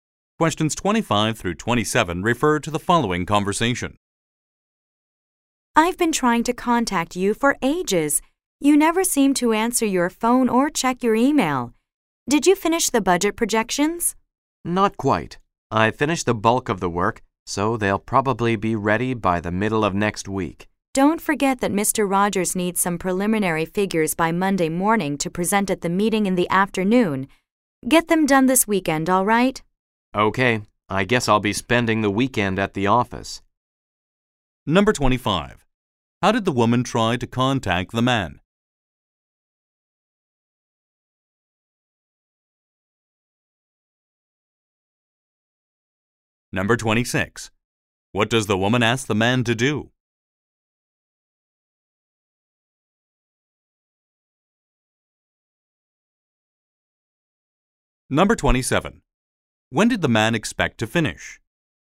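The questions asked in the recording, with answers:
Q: How did the woman try to contact the man?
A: By phone and email

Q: What does the woman ask the man to do?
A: Finish preliminary figures this weekend

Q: When did the man expect to finish?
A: By the middle of next week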